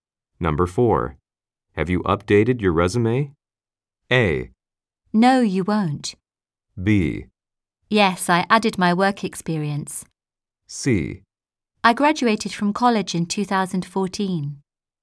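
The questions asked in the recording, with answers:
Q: Have you updated your resume?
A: B: Yes, I added my work experience.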